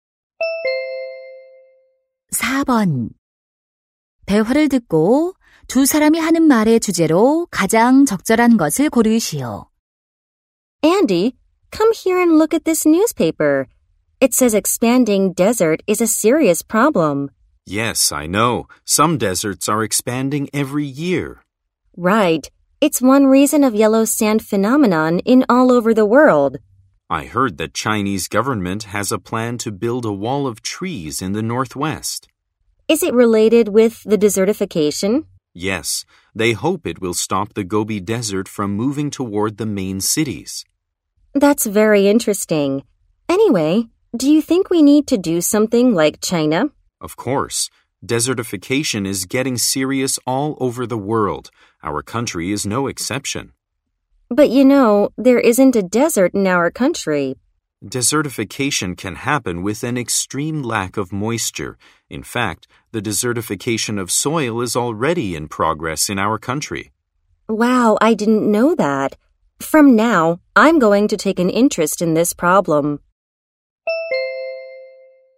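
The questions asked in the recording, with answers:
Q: 대화를 듣고 두 사람이 하는 말의 주제로 가장 적절한 것을 고르시오.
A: 사막화 문제의 심각성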